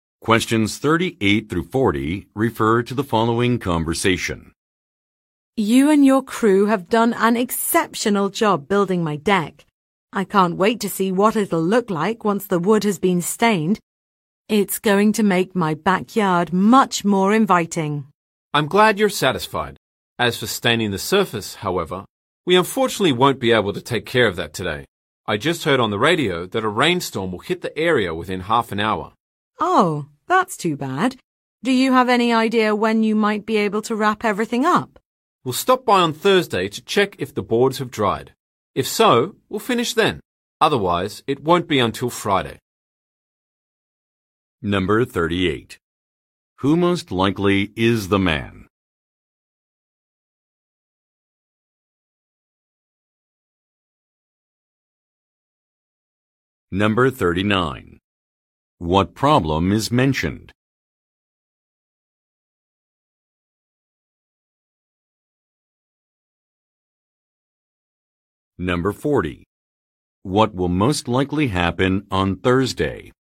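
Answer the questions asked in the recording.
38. A builder/contractor who built the woman's deck
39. A rainstorm is coming, so the deck can't be stained today
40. The crew will check whether the boards have dried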